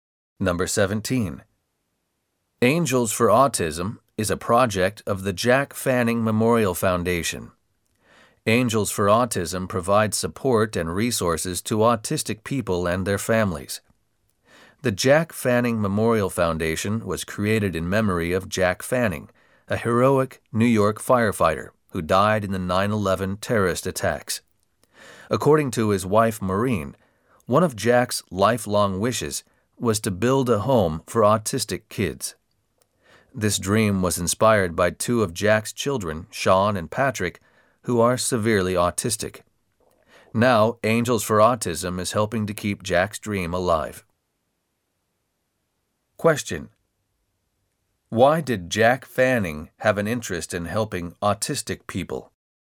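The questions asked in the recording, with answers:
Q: Question: Why did Jack Fanning have an interest in helping autistic people?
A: Two of his children were severely autistic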